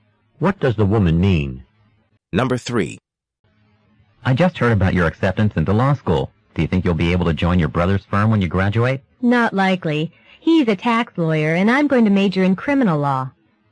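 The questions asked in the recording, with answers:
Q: What does the woman imply?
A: She probably won't join her brother's firm because they practice different kinds of law.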